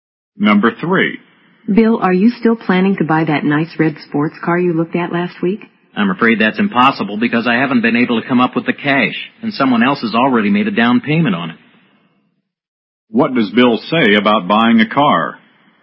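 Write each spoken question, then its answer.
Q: What does Bill say about buying a car?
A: He couldn't get the money, and someone else has already put a down payment on it.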